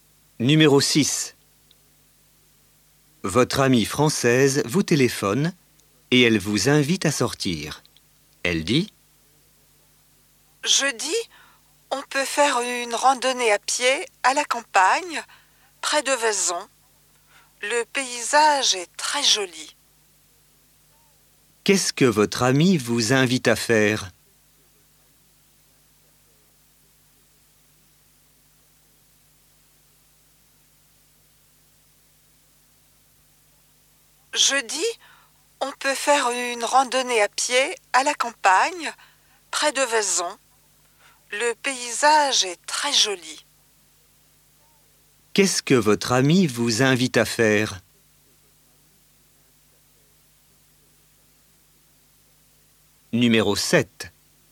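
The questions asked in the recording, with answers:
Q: Qu'est-ce que votre amie vous invite à faire ?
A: Une randonnée à pied à la campagne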